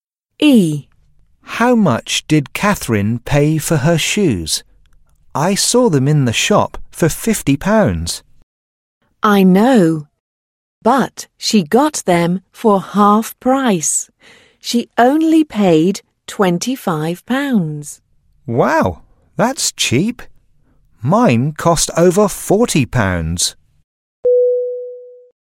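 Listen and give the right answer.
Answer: £25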